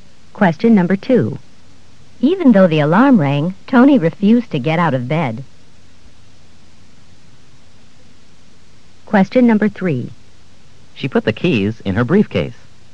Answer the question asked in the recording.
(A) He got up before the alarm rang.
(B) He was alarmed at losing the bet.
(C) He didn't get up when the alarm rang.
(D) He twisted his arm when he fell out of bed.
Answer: (C) He didn't get up when the alarm rang.

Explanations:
Even though the alarm rang, Tony refused to get out of bed.

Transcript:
2. Even though the alarm rang, Tony refused to get out of bed.